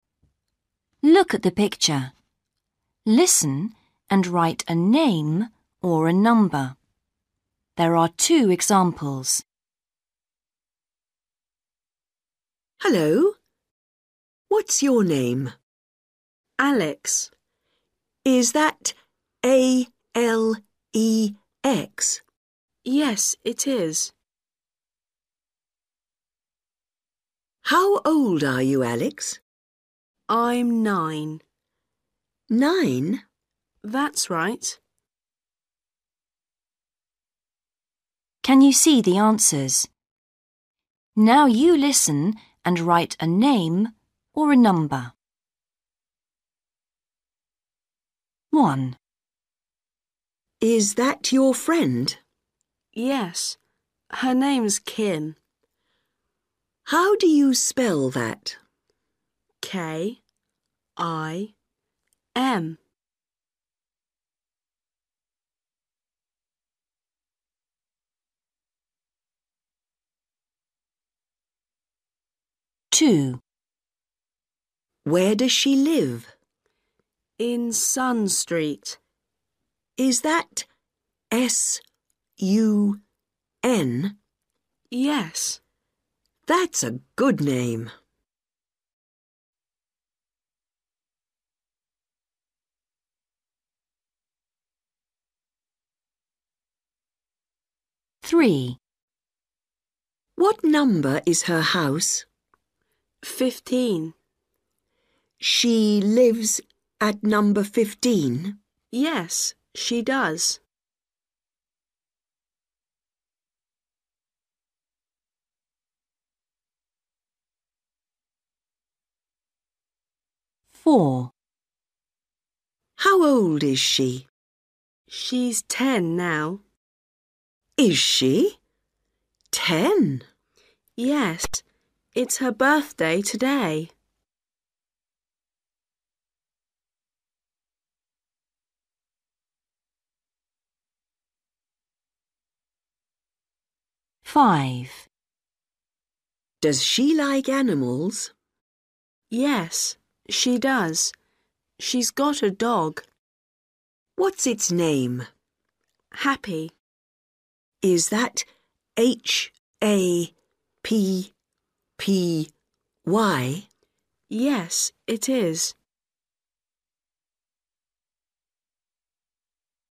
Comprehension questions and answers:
Read the question. Listen and write a name or a number.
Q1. What's the name of Alex's friend? ...........................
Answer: Kim

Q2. Where does she live? ...........................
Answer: Sun

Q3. What's the number of her house? ...........................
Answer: 15/fifteen

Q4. How old is she? ...........................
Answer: 10/ten

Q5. What's the name of her dog? ...........................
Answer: Happy

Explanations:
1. BOY: Yes, her name's Kim.
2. BOY: In Sun Street.

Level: Starters